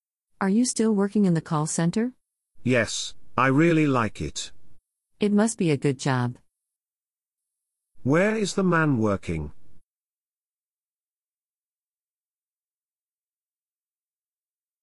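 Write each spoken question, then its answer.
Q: Where is the man working?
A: In a call center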